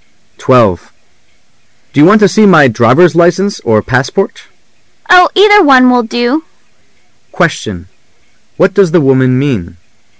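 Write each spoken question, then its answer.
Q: What does the woman mean?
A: Either the driver's license or the passport is fine.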